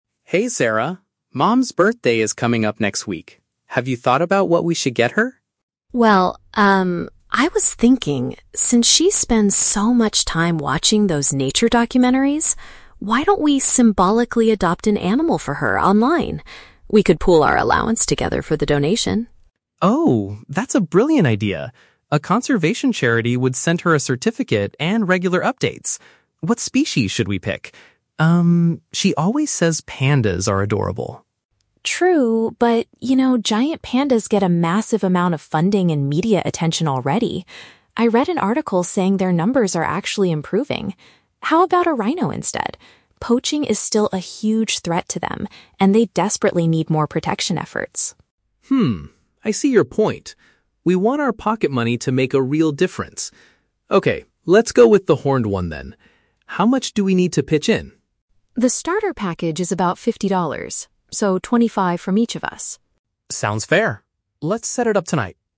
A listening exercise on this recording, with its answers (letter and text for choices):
Listen to the conversation between a brother and sister. Choose the correct answer (A, B, or C) for each question.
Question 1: Why did Sarah suggest adopting an animal online?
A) Because her mother enjoys programs about wildlife.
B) Because she wants to go on a safari trip soon.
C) Because her mother recently asked for a new pet.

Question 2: Why do they decide NOT to choose the panda?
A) Pandas are currently too expensive to adopt.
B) They believe another animal requires the financial support more.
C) Their mother thinks that pandas are quite boring.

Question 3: How will the brother and sister pay for the birthday present?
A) By asking their parents for some extra cash.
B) By combining their own personal savings.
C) By working extra hours at a part-time job.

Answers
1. A) Because her mother enjoys programs about wildlife.
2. B) They believe another animal requires the financial support more.
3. B) By combining their own personal savings.

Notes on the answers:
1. In the audio, Sarah says their mother watches "nature documentaries". Option A uses the synonym "programs about wildlife".
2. Sarah mentions that pandas already get a "massive amount of funding", while rhinos face poaching and "desperately need more protection efforts". This matches option B.
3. Sarah suggests they "pool our allowance together" and Mark mentions using their "pocket money" to "pitch in". Option B perfectly paraphrases this idea.

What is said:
Mark: Hey, Sarah. Mom's birthday is coming up next week. Have you thought about what we should get her?
Sarah: Well, um, I was thinking... since she spends so much time watching those nature documentaries, why don't we symbolically adopt an animal for her online? We could pool our allowance together for the donation.
Mark: Oh, that's a brilliant idea! A conservation charity would send her a certificate and regular updates. What species should we pick? Um, she always says pandas are adorable.
Sarah: True, but... you know, giant pandas get a massive amount of funding and media attention already. I read an article saying their numbers are actually improving. How about a rhino instead? Poaching is still a huge threat to them, and they desperately need more protection efforts.
Mark: Hmm, I see your point. We want our pocket money to make a real difference. Okay, let's go with the horned one then. How much do we need to pitch in?
Sarah: The starter package is about fifty dollars. So, twenty-five from each of us.
Mark: Sounds fair. Let's set it up tonight!